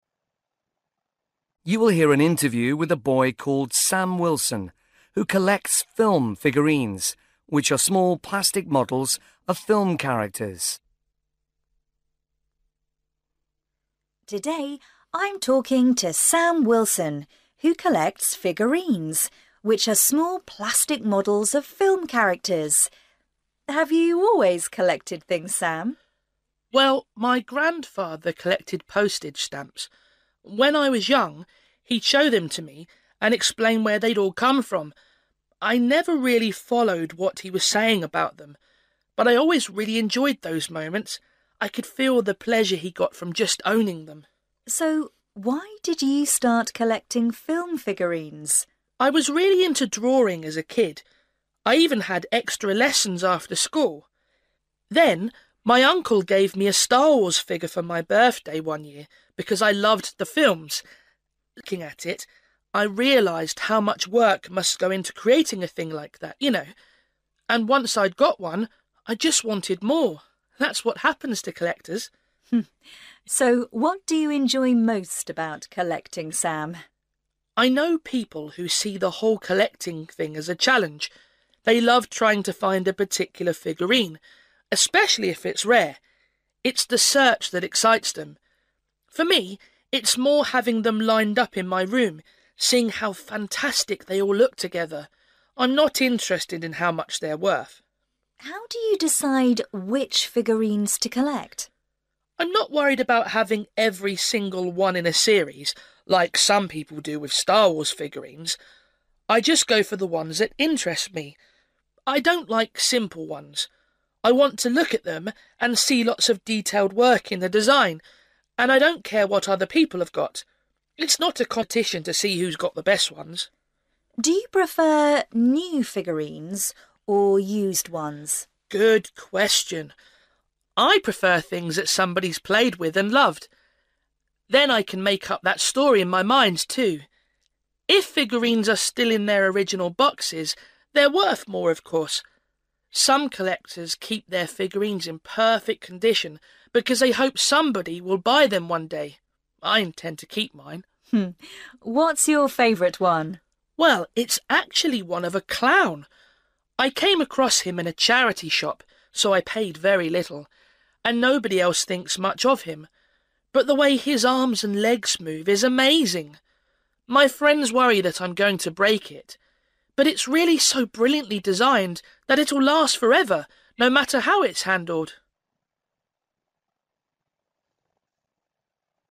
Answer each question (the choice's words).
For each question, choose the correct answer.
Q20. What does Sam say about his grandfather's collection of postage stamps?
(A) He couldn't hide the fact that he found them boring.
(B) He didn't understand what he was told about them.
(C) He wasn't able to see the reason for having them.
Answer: He didn't understand what he was told about them.

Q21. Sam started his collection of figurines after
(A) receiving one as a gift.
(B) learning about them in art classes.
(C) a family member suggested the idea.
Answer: receiving one as a gift.

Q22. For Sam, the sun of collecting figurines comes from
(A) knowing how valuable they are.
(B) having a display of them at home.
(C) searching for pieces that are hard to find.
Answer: having a display of them at home.

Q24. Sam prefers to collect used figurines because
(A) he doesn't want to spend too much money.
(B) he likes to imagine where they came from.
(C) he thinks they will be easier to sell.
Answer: he likes to imagine where they came from.

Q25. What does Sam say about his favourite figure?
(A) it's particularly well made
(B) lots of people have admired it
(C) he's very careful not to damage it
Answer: it's particularly well made

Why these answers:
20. 'I never really followed what he was saying about them...'
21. 'Then, my uncle gave me a Star Wars figure for my birthday one year...'
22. 'For me, it's more having them lined up in my room, seeing how fantastic they all look together.'
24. 'I prefer things that somebody's played with and loved, then I can make up that story in my mind, too.'
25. '... but it's really so brilliantly designed that it'll last forever, no matter how it's handled.'

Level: B1